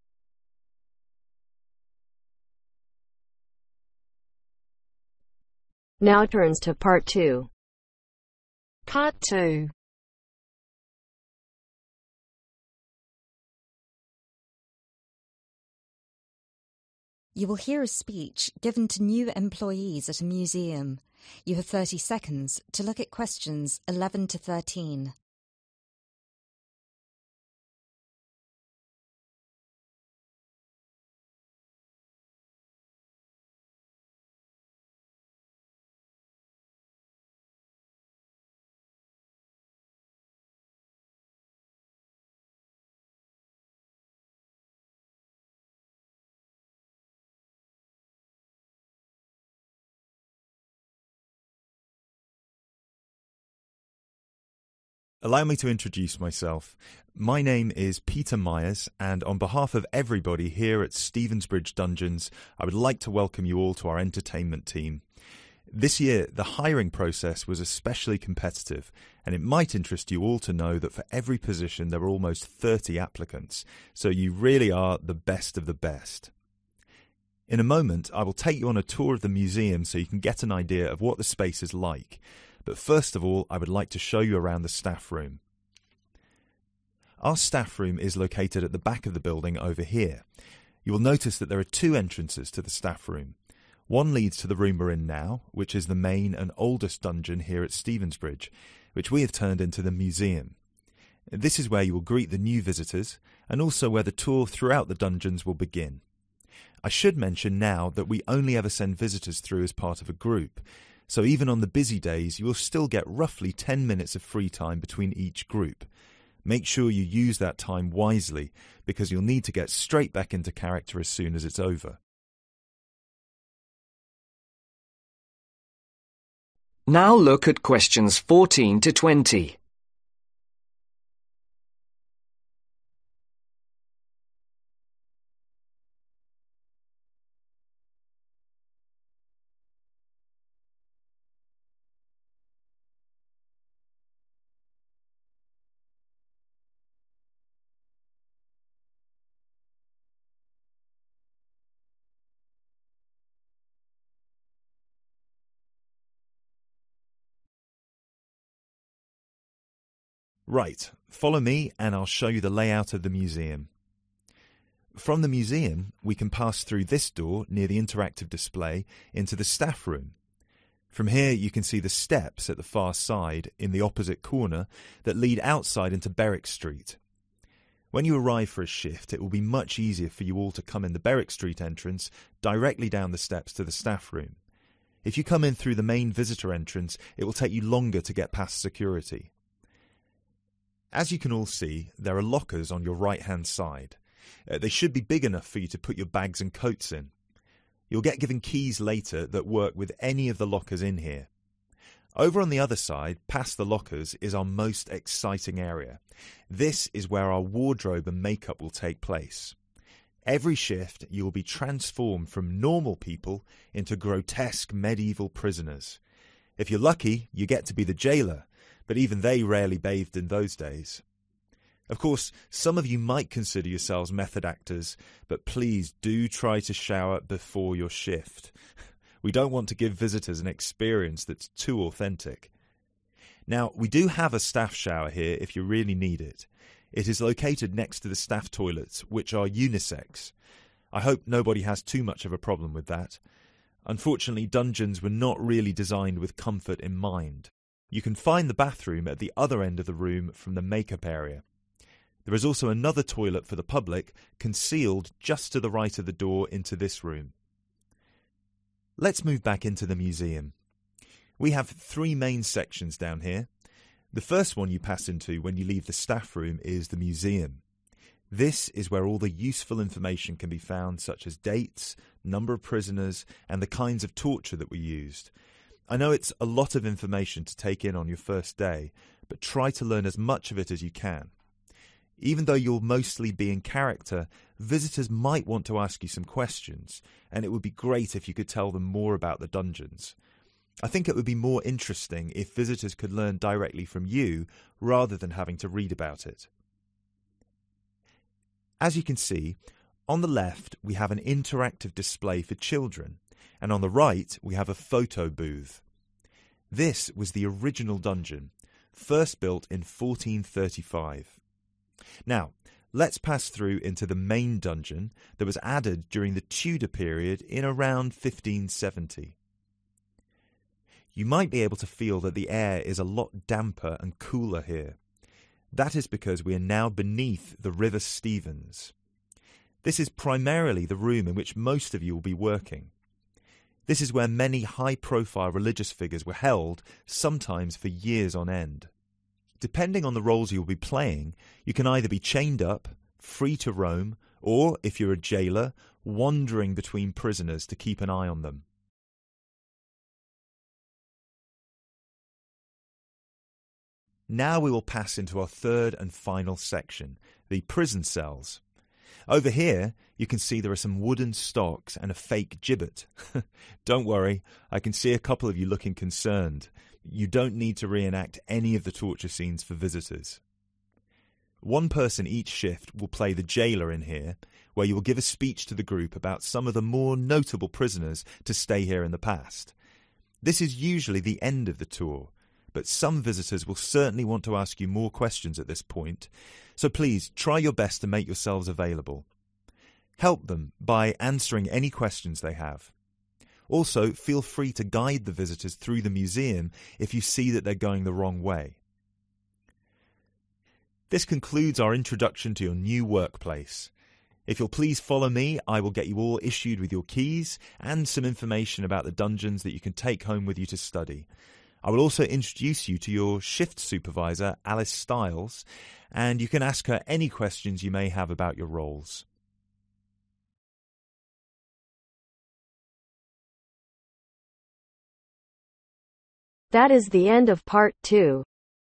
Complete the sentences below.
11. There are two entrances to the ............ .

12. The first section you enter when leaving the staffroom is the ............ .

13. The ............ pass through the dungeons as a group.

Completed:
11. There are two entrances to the Staffroom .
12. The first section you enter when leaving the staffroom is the Museum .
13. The Visitors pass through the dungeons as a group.